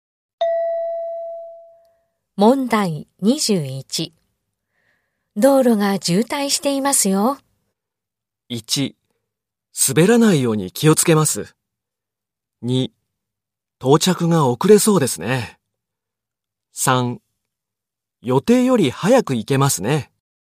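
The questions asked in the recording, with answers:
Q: 道路が渋滞していますよ。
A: 2: 到着が遅れそうですね。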